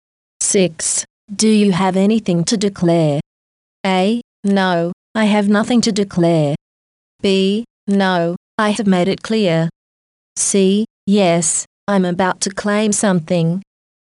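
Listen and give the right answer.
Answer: A: No, I have nothing to declare.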